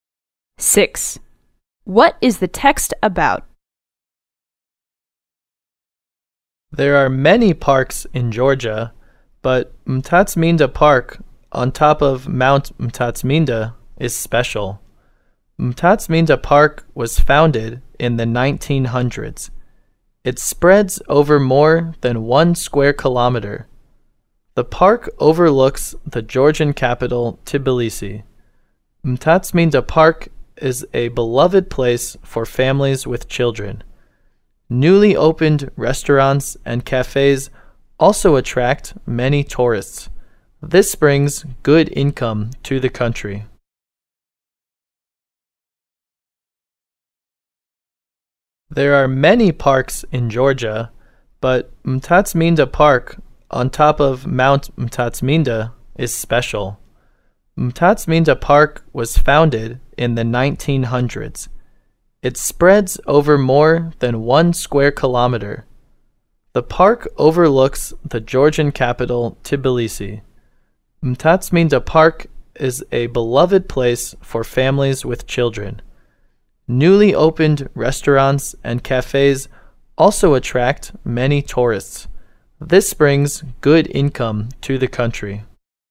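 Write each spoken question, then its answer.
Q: What is the text about?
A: Mtatsminda Park in Tbilisi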